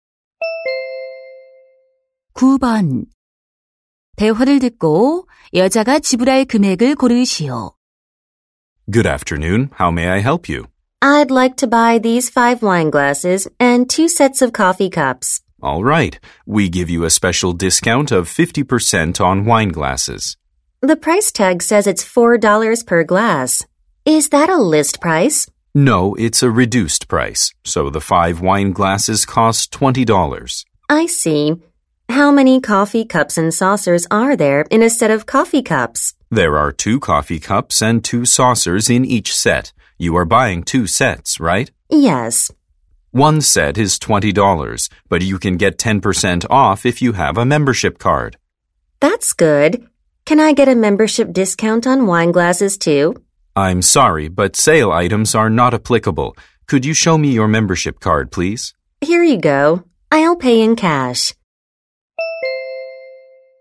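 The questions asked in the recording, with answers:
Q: 대화를 듣고 여자가 지불할 금액을 고르시오.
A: $56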